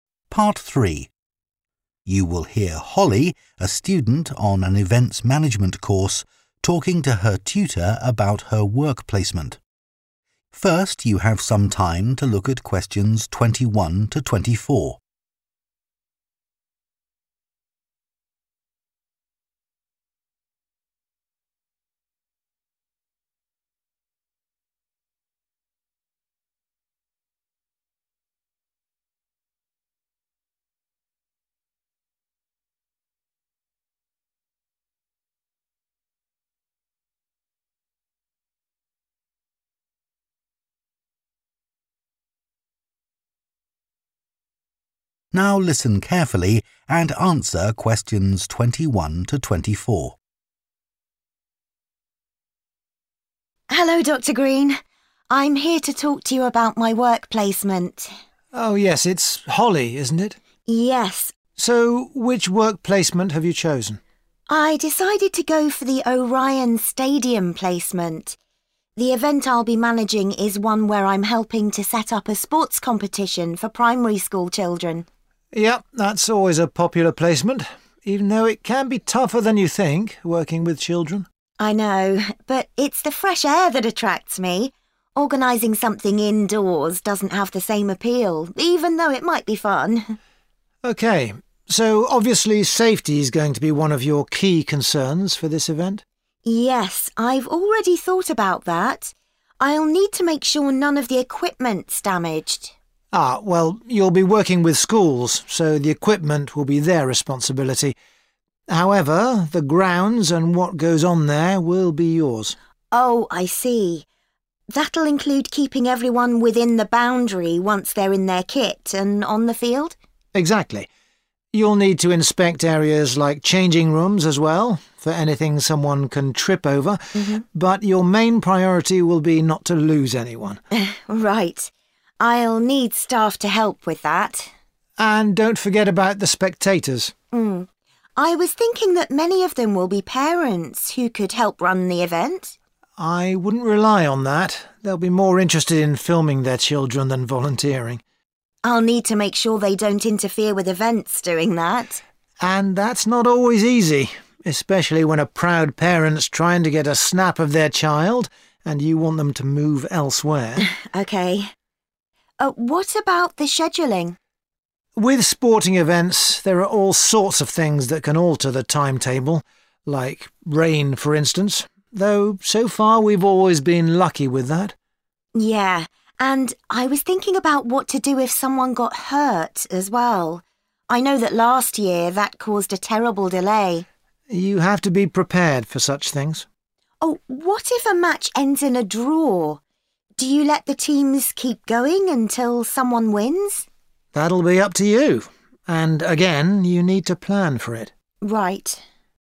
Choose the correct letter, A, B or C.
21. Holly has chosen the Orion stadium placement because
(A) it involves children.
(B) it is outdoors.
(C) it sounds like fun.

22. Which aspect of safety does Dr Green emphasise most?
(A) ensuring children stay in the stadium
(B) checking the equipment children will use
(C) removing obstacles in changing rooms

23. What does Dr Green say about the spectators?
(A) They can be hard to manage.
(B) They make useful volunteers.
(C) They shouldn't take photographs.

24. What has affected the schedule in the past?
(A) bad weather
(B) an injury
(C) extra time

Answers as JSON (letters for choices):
{"21": "B", "22": "A", "23": "A", "24": "B"}

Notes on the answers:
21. I know, but it's the fresh air that attracts me – organising something indoors doesn't have the same appeal [không khí trong lành là thứ thu hút tôi – tổ chức một cái gì đó trong nhà không có sức hấp dẫn tương tự → Chọn đáp án B]